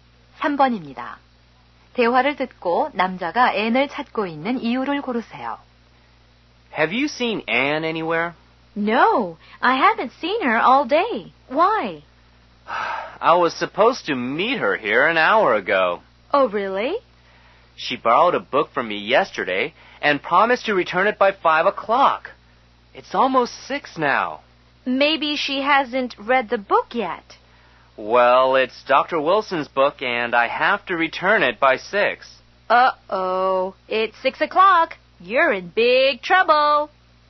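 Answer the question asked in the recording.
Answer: 빌려준 책을 돌려받으려고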